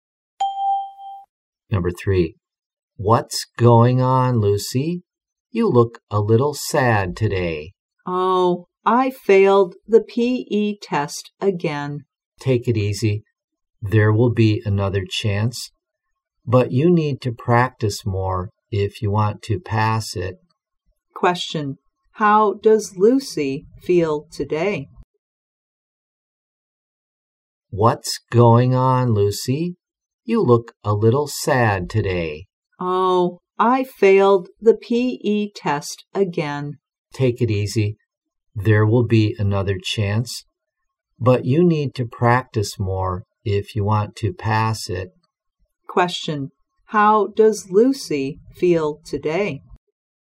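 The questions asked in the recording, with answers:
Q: How does Lucy feel today?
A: Sad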